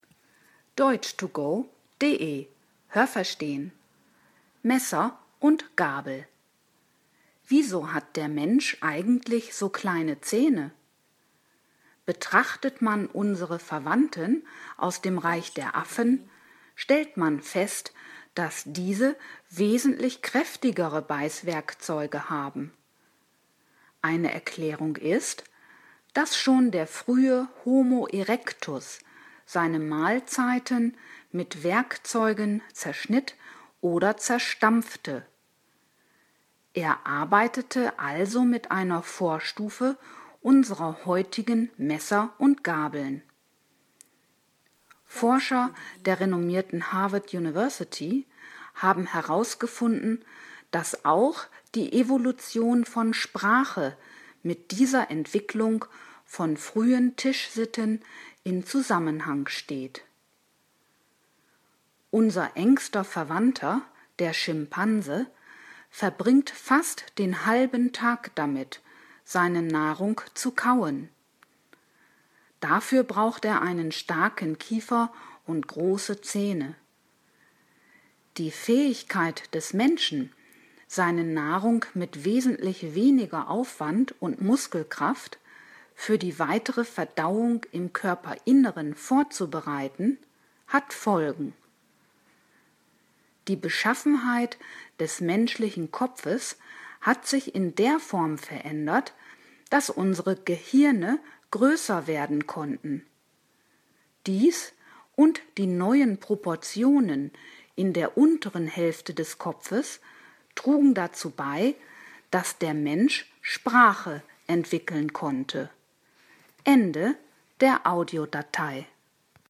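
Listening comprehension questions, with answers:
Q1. Die Beißwerkzeuge von Affen sind stärker ausgeprägt als die des Menschen.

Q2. Der Homo erectus benutzte für die Zerkleinerung seiner Mahlzeit Hilfsmittel.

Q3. Schon der Homo erectus kannte Messer und Gabel.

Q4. Der Schimpanse verbringt fast den halben Tag damit, nach Nahrung zu suchen.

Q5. Dass der frühe Mensch seine Nahrung zerkleinert zu sich nahm, hatte in der Evolution Auswirkungen auf die Gestalt seines Kopfes.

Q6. Das Gehirn des Menschen hat im Laufe der Evolution an Volumen eingebüßt.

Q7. Die Entwicklung von Sprache steht in Zusammenhang mit der Eigenart des menschlichen Kopfes.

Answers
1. Richtig
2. Richtig
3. Falsch
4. Falsch
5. Richtig
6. Falsch
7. Richtig

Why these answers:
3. Er arbeitete noch mit Werkzeugen, die eine Vortstufe unserer heutigen Messer und Gabeln darstellen.
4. Der Text sagt nur, dass er so lange an seiner Nahrung kaut.
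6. Laut Text konnten unsere Gehirne (zunächst) größer werden. („Laut Text" deswegen, weil wir kleinere Gehirne haben als z.B. der Neanderthaler oder andere Primaten.)

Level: Hörtexte C (schwer)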